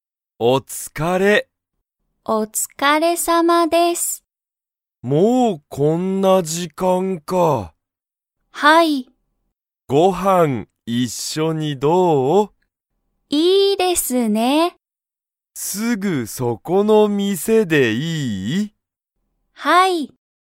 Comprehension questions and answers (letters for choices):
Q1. なおやとさちこは、一緒(いっしょ)にご飯(はん)を食(た)べますか?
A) はい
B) いいえ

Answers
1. A

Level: Level 1